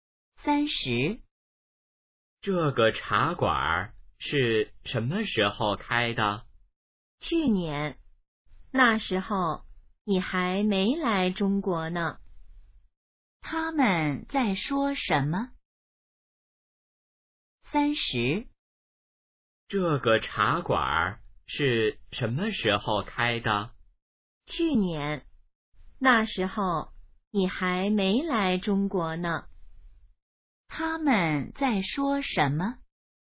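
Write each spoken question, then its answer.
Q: 他们在说什么?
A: 茶馆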